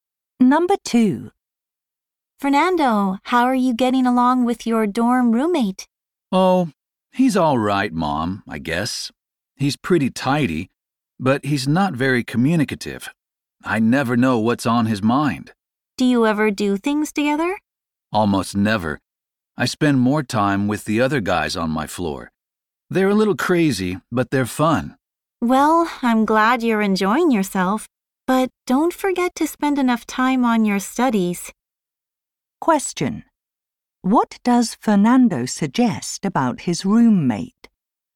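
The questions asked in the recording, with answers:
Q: What does Fernando suggest about his roommate?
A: He doesn't talk much, so Fernando never knows what he is thinking.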